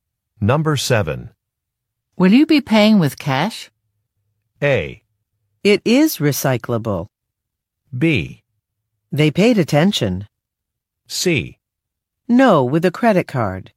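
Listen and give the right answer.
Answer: C: No, with a credit card.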